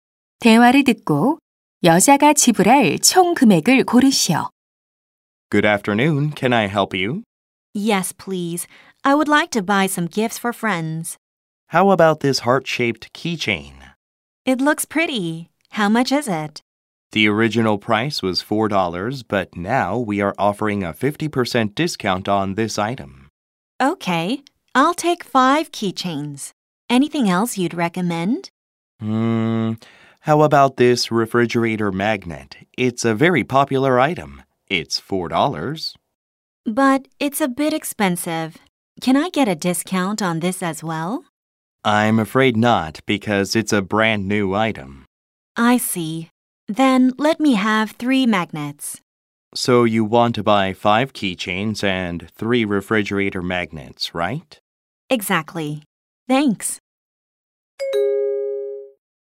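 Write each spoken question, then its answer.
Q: 대화를 듣고 여자가 지불할 총 금액을 고르시오.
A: $22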